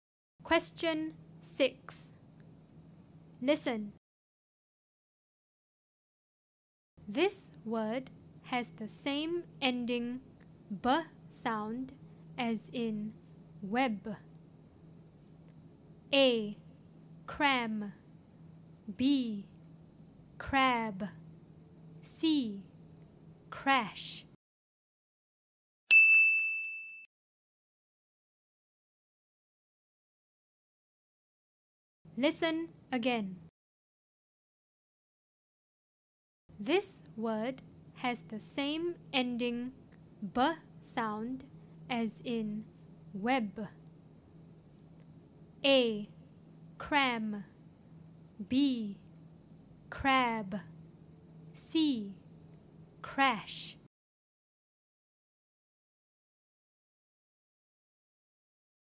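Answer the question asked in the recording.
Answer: B: Crab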